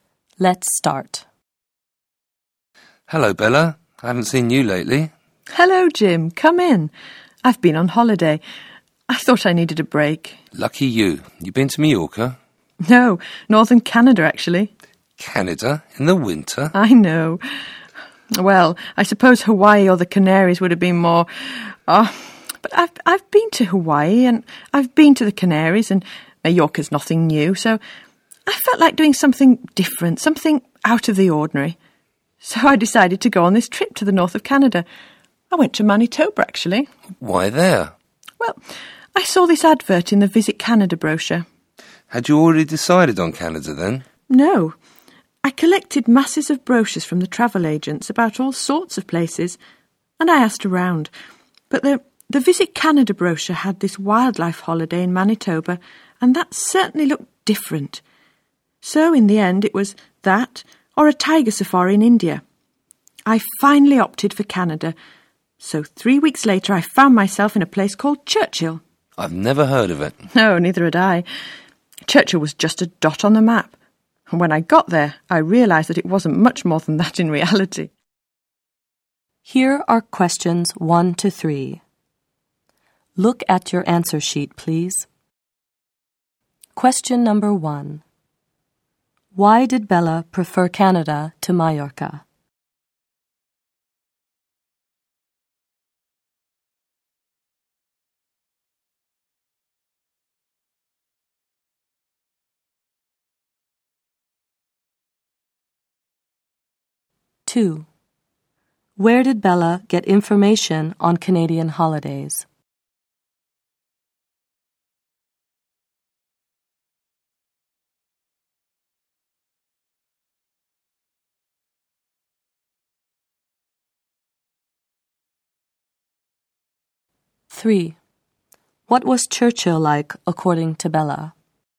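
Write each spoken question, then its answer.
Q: Why did Bella prefer Canada to Mallorca?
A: She'd been to Mallorca before and wanted something different, out of the ordinary

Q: Where did Bella get information on Canadian holidays?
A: From the Visit Canada brochure (from travel agents)

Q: What was Churchill like, according to Bella?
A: Very small, just a dot on the map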